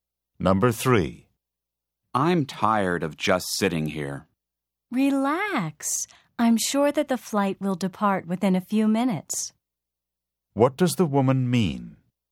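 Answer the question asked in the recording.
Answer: The flight will leave soon.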